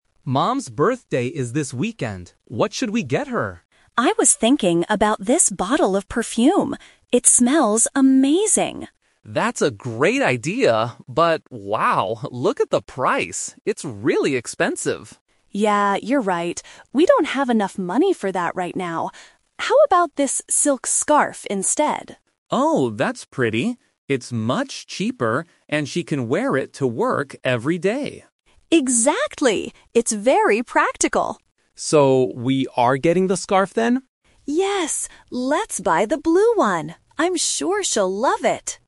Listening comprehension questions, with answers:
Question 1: What is the problem with the perfume?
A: It is too expensive.

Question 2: Why do they think the silk scarf is a good gift?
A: It is cheap and practical.

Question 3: What do they decide to buy in the end?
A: A blue silk scarf.

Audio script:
Leo: Mom's birthday is this weekend. What should we get her?
Maya: I was thinking about this bottle of perfume. It smells amazing.
Leo: That's a great idea, but... wow, look at the price. It's really expensive.
Maya: Yeah, you're right. We don't have enough money for that right now. How about this silk scarf instead?
Leo: Oh, that's pretty. It's much cheaper, and she can wear it to work every day.
Maya: Exactly! It's very practical.
Leo: So, we are getting the scarf then?